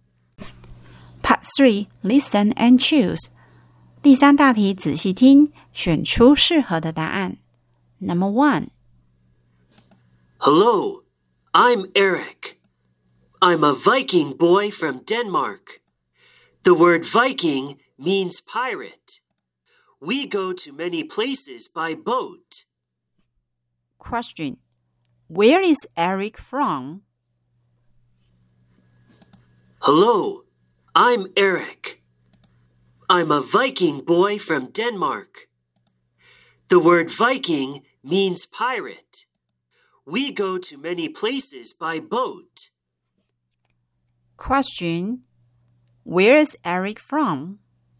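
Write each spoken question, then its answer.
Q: Where is Eric from?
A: Denmark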